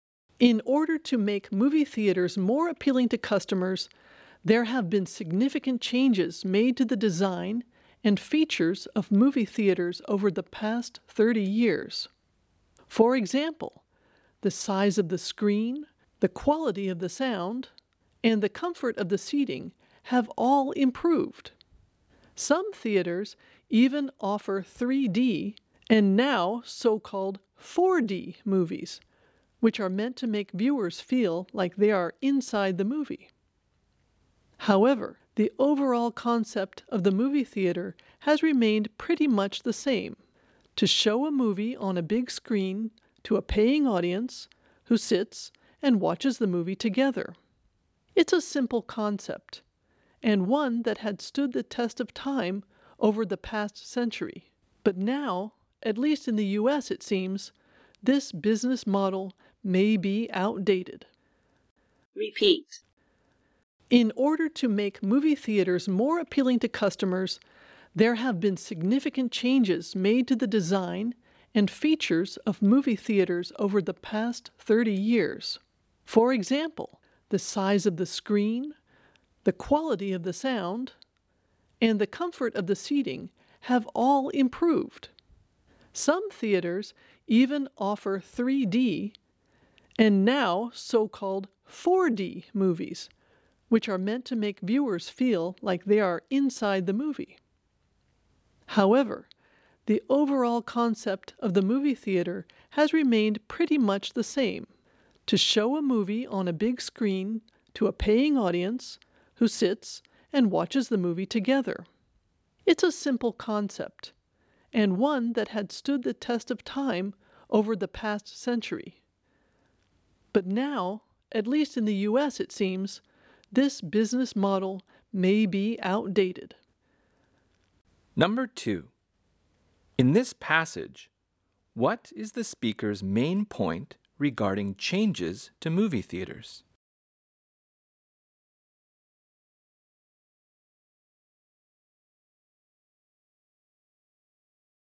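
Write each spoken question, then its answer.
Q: In this passage, what is the speaker's main point regarding changes to movie theaters?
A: Despite improvements, the basic concept stayed the same and may now be outdated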